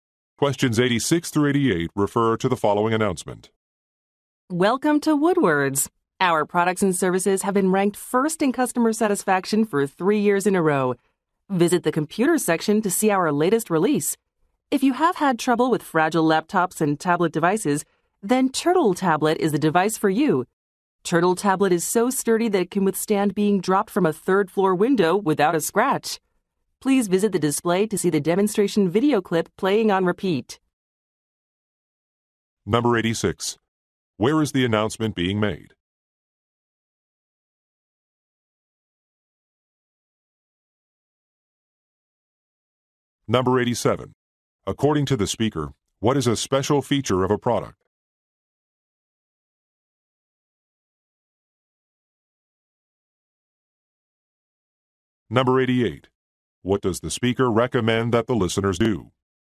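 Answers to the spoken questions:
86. In a store (Woodward's)
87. It is very durable
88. Watch a demonstration video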